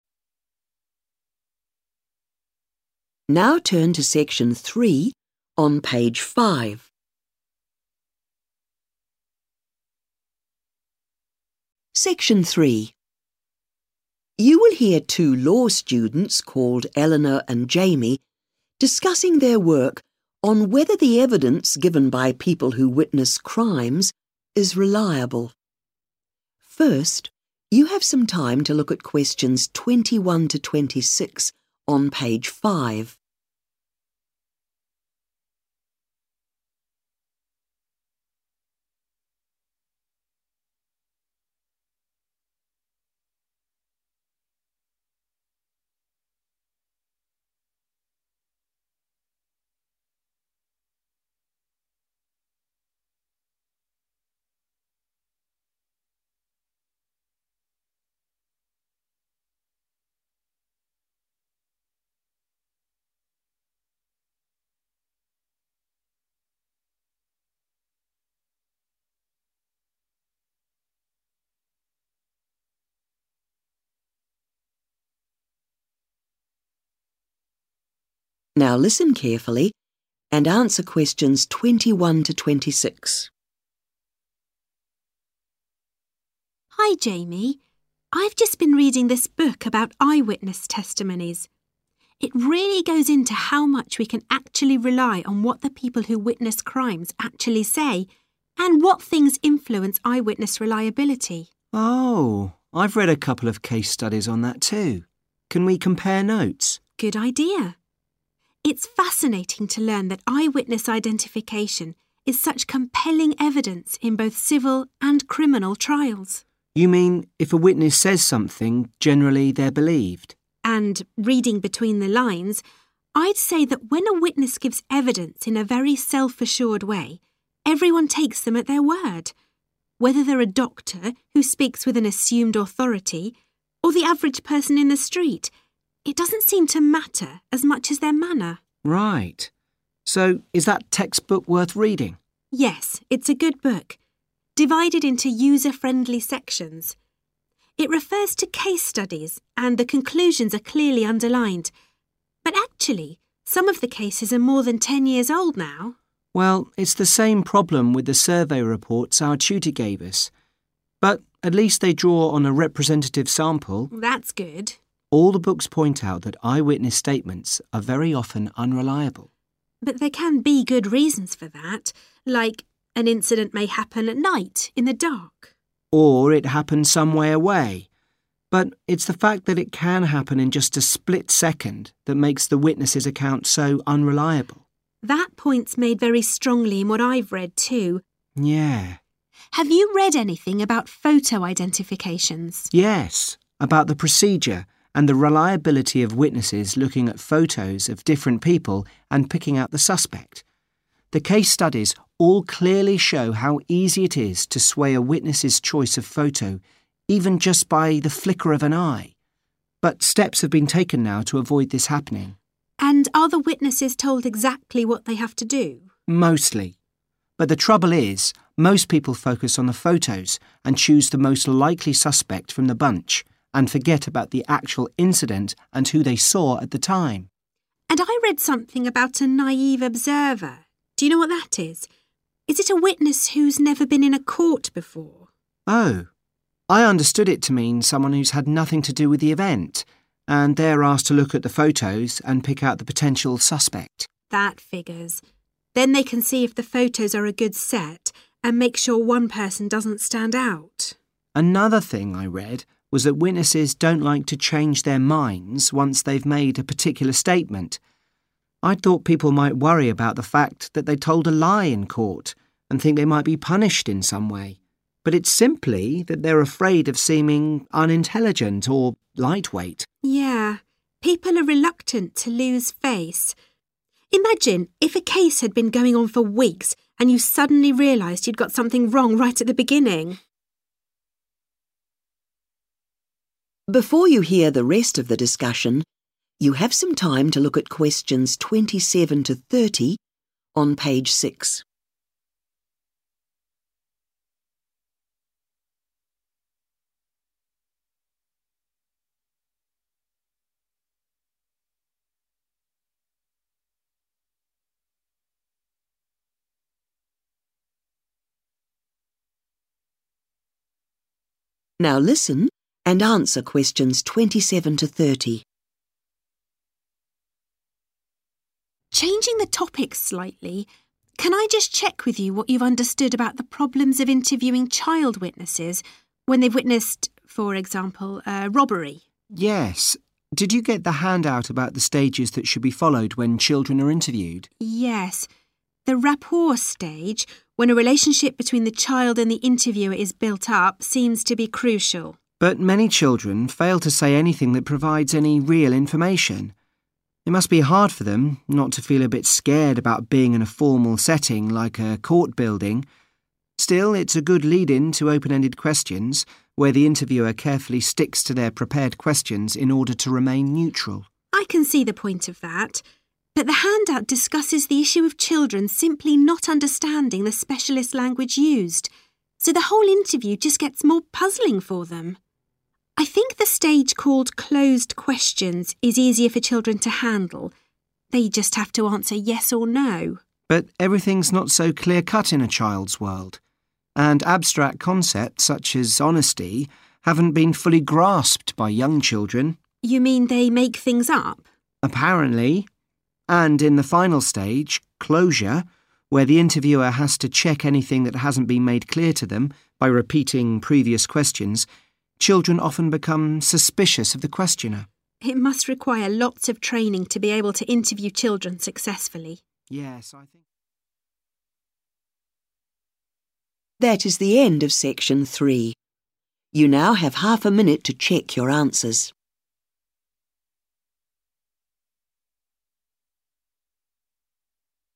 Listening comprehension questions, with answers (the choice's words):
Choose the correct letter, A, B, or C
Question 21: Eleanor thinks eyewitnesses are believed when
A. they are respected members of the community.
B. they make their statements with confidence.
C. they use sophisticated language in their accounts.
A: they make their statements with confidence.

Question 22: What concerns Duckie, Eleanor, and Jamie about the texts they have read so far?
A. No clear conclusions are reached.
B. The studies involved comparatively few people.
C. Some of the data were gathered some time ago.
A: Some of the data were gathered some time ago.

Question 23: They agree that the most significant factor affecting eyewitness reliability is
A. how good the lighting is.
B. how long the event lasts.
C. how far away the witness is.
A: how long the event lasts.

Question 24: Jamie criticizes photo-identifications, saying witnesses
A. fail to compare the photos with their memory of the event.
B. are not properly briefed about the procedure.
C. become easily influenced by a figure of authority.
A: fail to compare the photos with their memory of the event.

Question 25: They agree that the term 'naive observer' means a person who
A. has no experience of a police investigation.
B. did not realize they were witnessing a crime.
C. was not present at the incident.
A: was not present at the incident.

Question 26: They have learned that witnesses are reluctant to change their opinions because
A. they do not want to appear foolish.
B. they fear the legal consequences.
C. they are keen for the case to be concluded.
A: they do not want to appear foolish.

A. Frightened by the unfamiliar environment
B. Influenced by the interviewer Duckie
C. Not understanding the difference between truth and lies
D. Unwillingness to say they don't know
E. Confused by the terminology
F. Distrust of the interviewer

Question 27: Rapport ............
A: Frightened by the unfamiliar environment

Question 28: Open-ended questions ............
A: Confused by the terminology

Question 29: Closed questions ............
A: Not understanding the difference between truth and lies

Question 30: Closure ............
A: Distrust of the interviewer